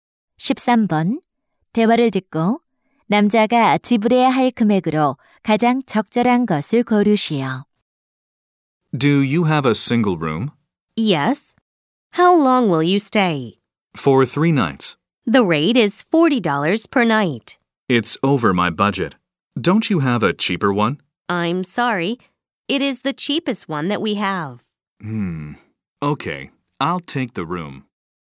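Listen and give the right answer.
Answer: 120달러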